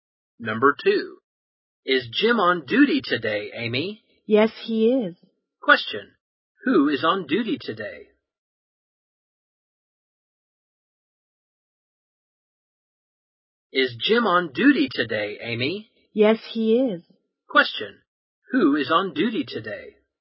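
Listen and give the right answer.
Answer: Jim.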